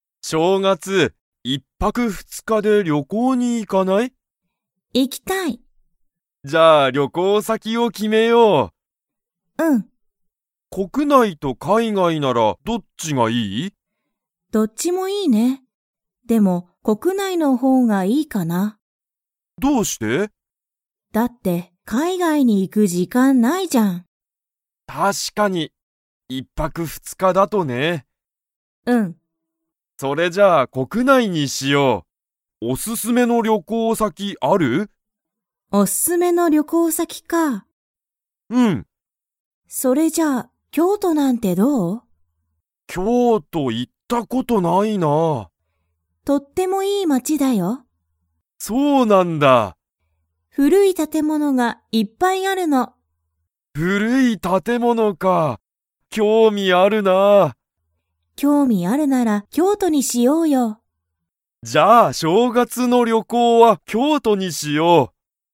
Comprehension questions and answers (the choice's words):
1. たかしとけいこは、正月しょうがつ海外かいがいに 。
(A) 行いく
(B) 行いかない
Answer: 行いかない

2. 京都きょうとには、何なにがいっぱいありますか?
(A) 優やさしい人ひと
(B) おいしい店みせ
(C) 古ふるい建物たてもの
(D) 大おおきい公園こうえん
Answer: 古ふるい建物たてもの

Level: Level 4